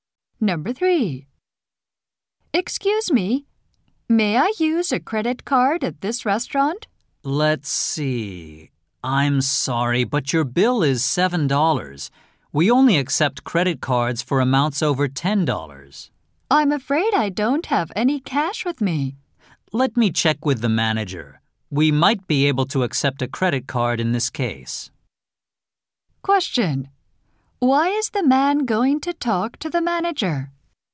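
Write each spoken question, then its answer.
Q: Why is the man going to talk to the manager?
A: The woman has no cash, and her $7 bill is under the $10 card minimum.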